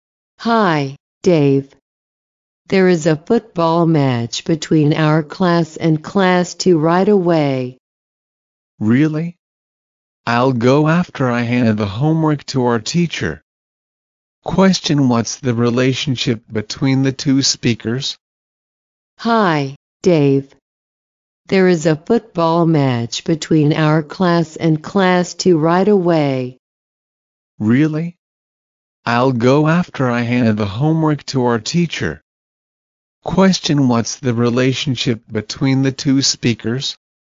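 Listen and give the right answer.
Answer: Classmates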